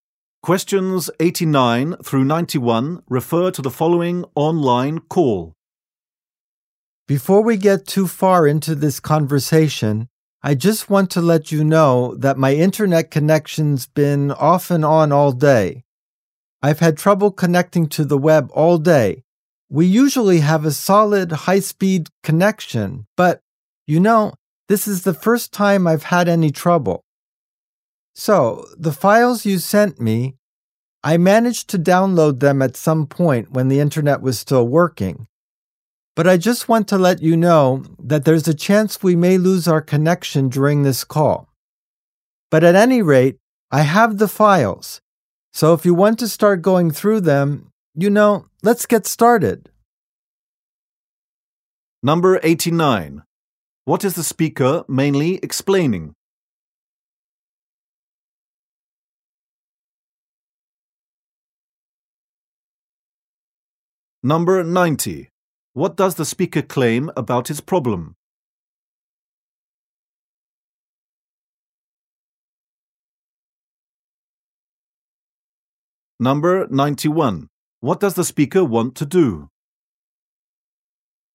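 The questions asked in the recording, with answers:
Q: What is the speaker mainly explaining?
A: His internet connection problem

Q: What does the speaker claim about his problem?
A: It is the first time it has happened

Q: What does the speaker want to do?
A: Start going through the files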